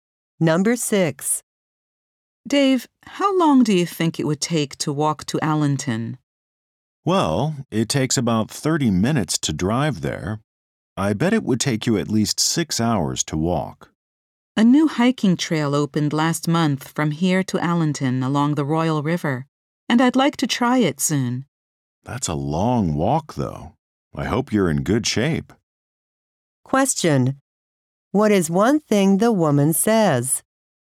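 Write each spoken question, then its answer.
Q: What is one thing the woman says?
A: A new hiking trail to Allenton opened and she wants to try it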